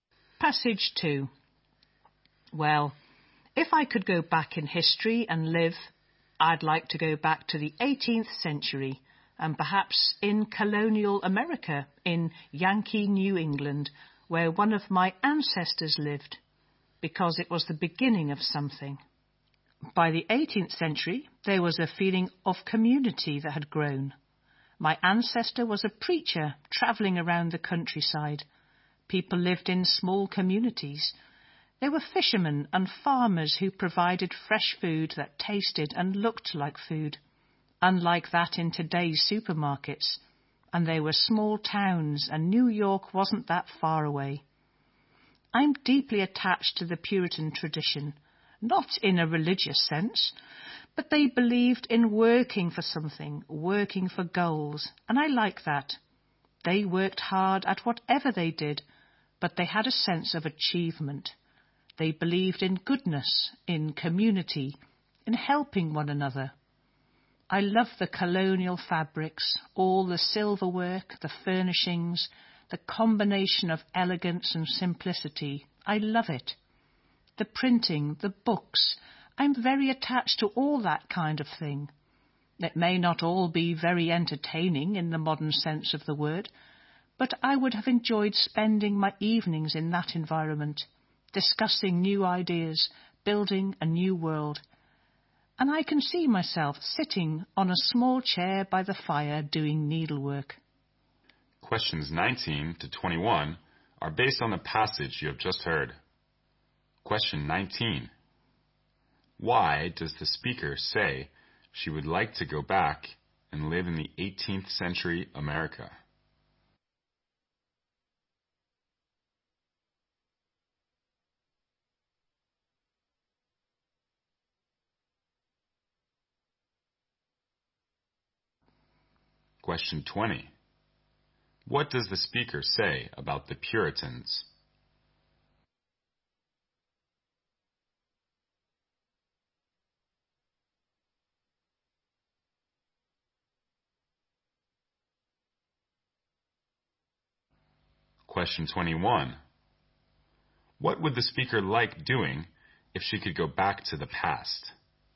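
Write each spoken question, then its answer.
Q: Why does the speaker say she would like to go back and live in the 18th century America?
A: Because it was the beginning of something

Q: What does the speaker say about the Puritans?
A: They worked hard for goals and believed in goodness, community and helping one another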